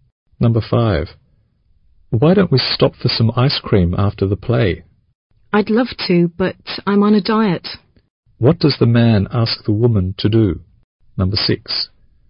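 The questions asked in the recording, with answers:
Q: What does the man ask the woman to do?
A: Stop for some ice cream after the play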